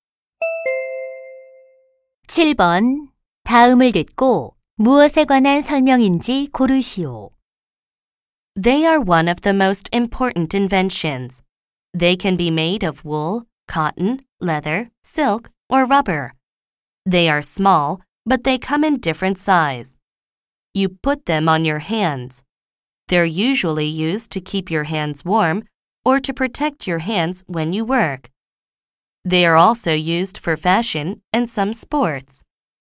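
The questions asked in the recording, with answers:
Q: 다음을 듣고 무엇에 관한 설명인지 고르시오.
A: 장갑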